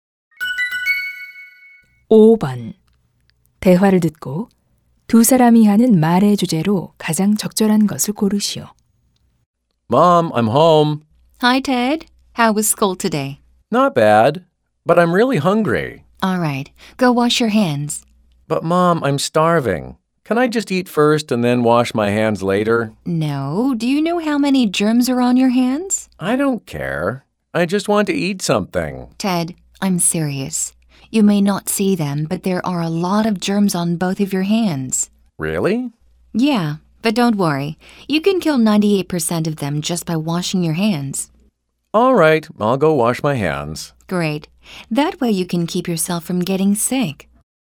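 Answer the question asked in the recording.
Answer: 손 씻기의 중요성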